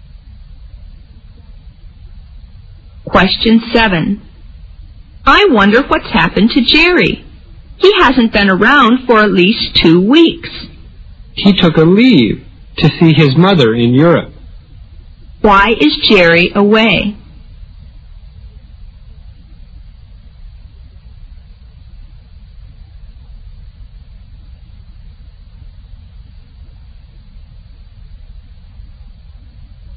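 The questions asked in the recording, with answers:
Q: Why is Jerry away?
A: He took leave to see his mother in Europe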